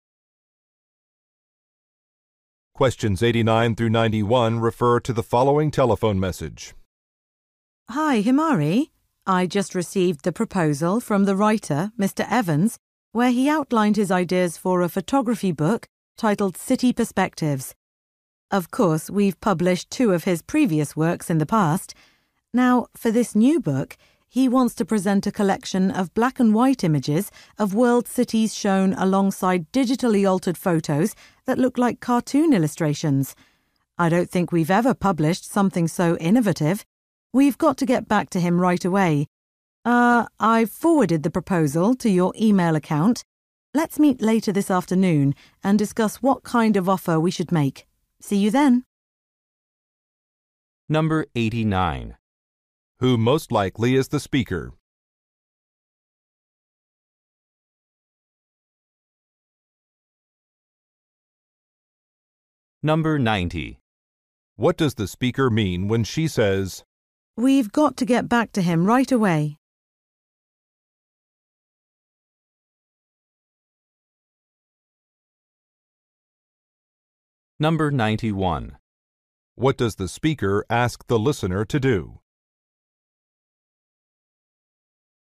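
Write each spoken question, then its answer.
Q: Who most likely is the speaker?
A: A book publisher

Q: What does the speaker ask the listener to do?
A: Meet later this afternoon to discuss an offer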